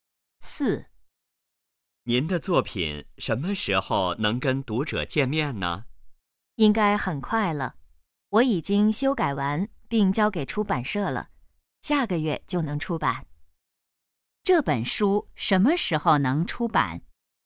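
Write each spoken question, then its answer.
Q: 这本书什么时候能出版?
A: 下个月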